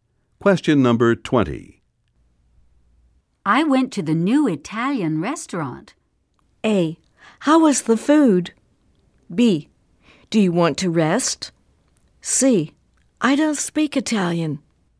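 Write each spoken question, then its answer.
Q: I went to the new Italian restaurant.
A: A: How was the food?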